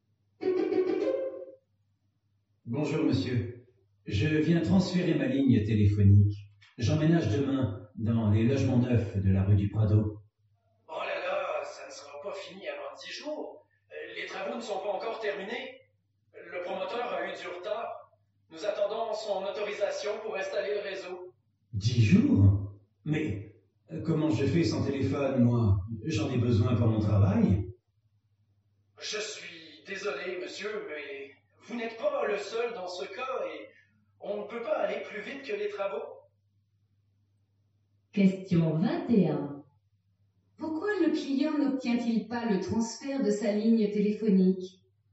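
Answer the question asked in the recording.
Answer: Parce que les travaux des logements ne sont pas terminés.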